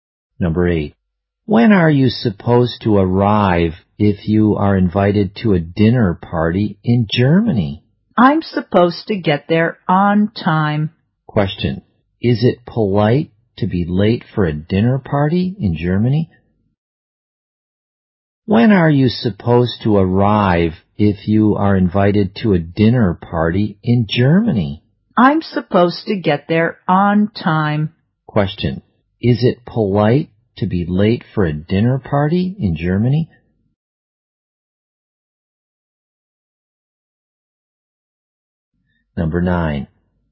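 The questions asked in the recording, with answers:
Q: Question. Is it polite to be late for a dinner party in Germany?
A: No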